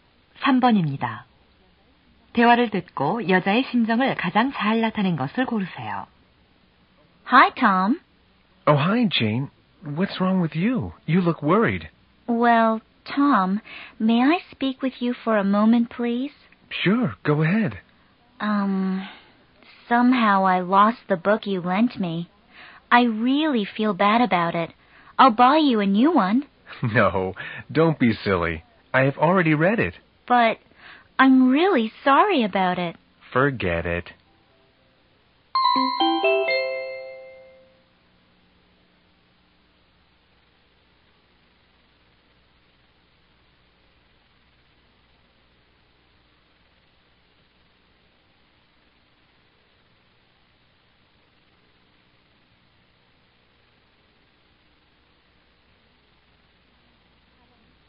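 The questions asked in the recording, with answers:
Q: 대화를 듣고 여자의 심정을 가장 잘 나타낸 것을 고르세요.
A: 미안함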